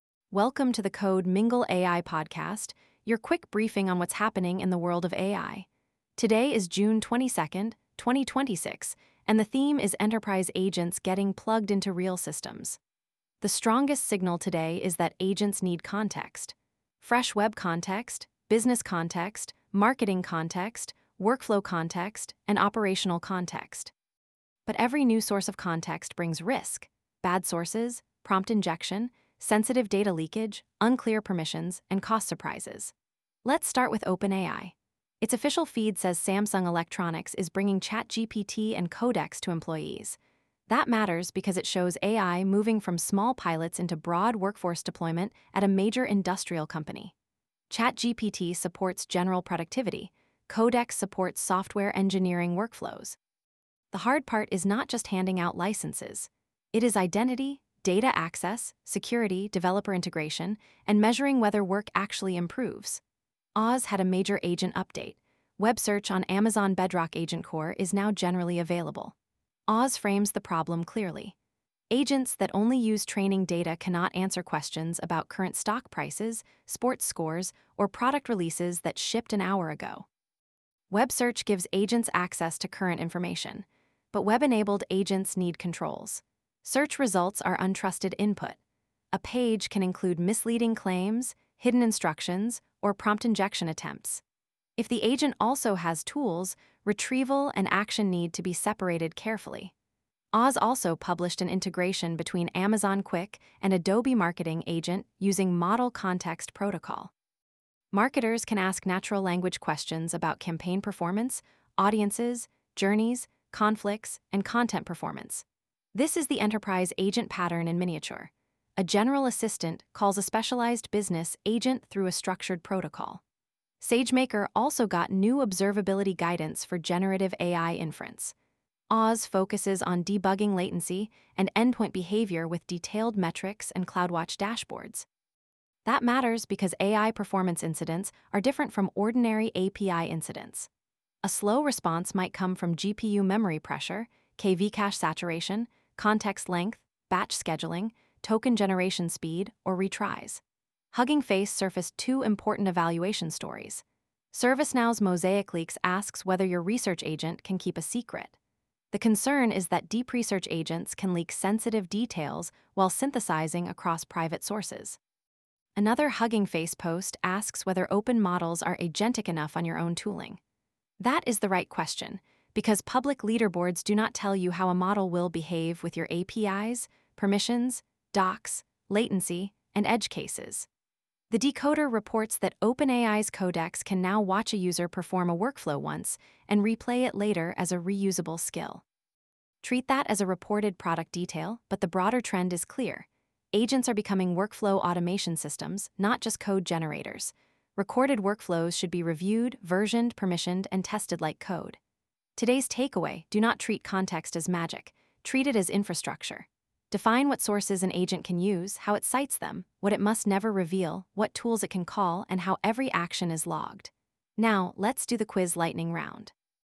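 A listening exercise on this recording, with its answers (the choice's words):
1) Why is OpenAI's Samsung Electronics deployment strategically important?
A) It signals broad workforce adoption of ChatGPT and Codex inside a major industrial enterprise.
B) It means AI is only used by small hobby projects.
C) It removes the need for security, identity, or workflow integration.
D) It is unrelated to enterprise AI adoption.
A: It signals broad workforce adoption of ChatGPT and Codex inside a major industrial enterprise.

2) What new capability does Web Search on Amazon Bedrock AgentCore give agents?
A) Managed access to current web information beyond the model's training data.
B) A way to disable all retrieval.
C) A replacement for every business database.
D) A static CSS theme for chat windows.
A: Managed access to current web information beyond the model's training data.

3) Why is MCP important in the Amazon Quick and Adobe Marketing Agent integration?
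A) It provides a structured way for an assistant to call a specialized business agent with governed access.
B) It prevents assistants from using business context.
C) It is only a video compression format.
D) It replaces authentication with public access.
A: It provides a structured way for an assistant to call a specialized business agent with governed access.

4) What does MosaicLeaks warn teams about?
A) Deep-research agents can leak sensitive information while synthesizing across private sources.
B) Research agents cannot read documents.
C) Privacy testing is unnecessary for enterprise agents.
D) Only image models can leak data.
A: Deep-research agents can leak sensitive information while synthesizing across private sources.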